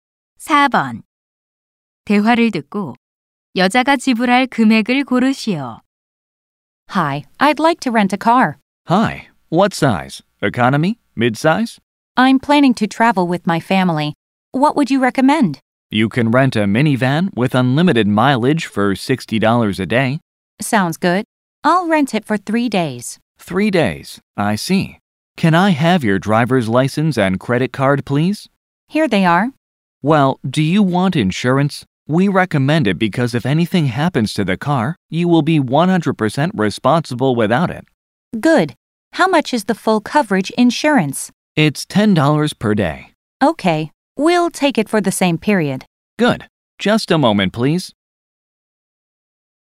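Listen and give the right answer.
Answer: $210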